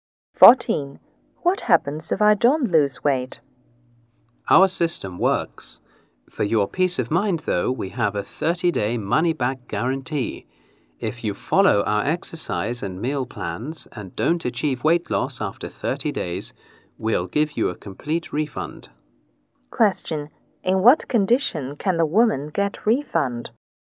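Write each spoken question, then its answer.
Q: In what condition can the woman get refund?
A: If she follows the exercise and meal plans and has not lost weight after 30 days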